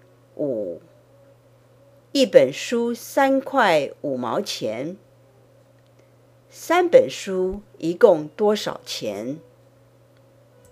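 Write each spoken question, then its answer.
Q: 三本书一共多少钱?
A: 10.5块钱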